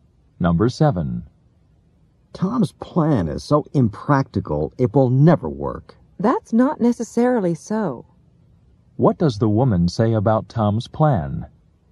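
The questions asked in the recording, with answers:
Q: What does the woman say about Tom's plan?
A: It might work; it isn't necessarily impractical.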